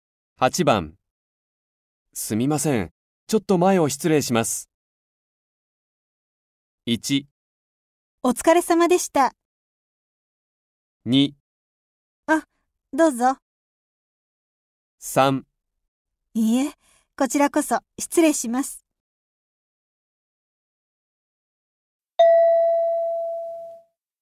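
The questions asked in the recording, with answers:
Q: すみません。ちょっと前を失礼します。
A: 2: あ、どうぞ。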